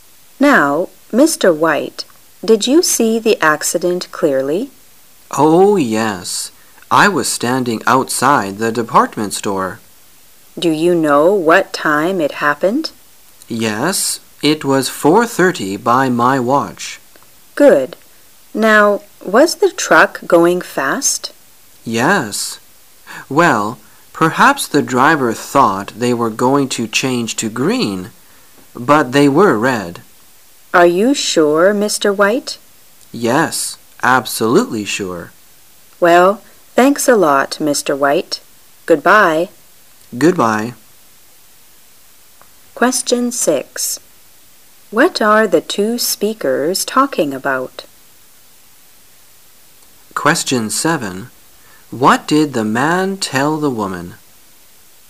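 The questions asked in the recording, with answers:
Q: What are the two speakers talking about?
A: A traffic accident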